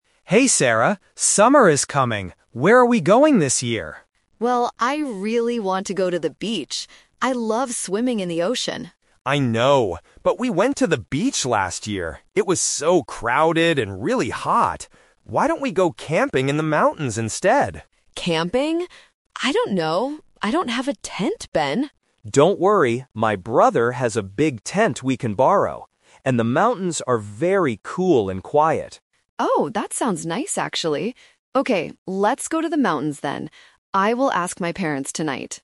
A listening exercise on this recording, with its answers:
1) Where did the friends go for their vacation last year?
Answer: To the beach.

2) Why is Sarah unsure about going camping at first?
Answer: Because she doesn't have the equipment for it.

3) What is their final decision for this summer?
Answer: They are going camping in the mountains.

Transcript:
Ben: Hey, Sarah. Summer is coming! Where are we going this year?
Sarah: Well, I really want to go to the beach. I love swimming in the ocean.
Ben: I know, but we went to the beach last year. It was so crowded and really hot. Why don't we go camping in the mountains instead?
Sarah: Camping? I don't know... I don't have a tent, Ben.
Ben: Don't worry, my brother has a big tent we can borrow. And the mountains are very cool and quiet.
Sarah: Oh, that sounds nice actually. Okay, let's go to the mountains then. I will ask my parents tonight.